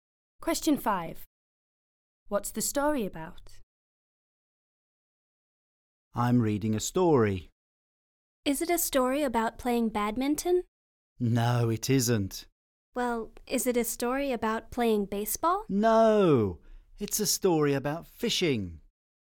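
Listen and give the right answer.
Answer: Fishing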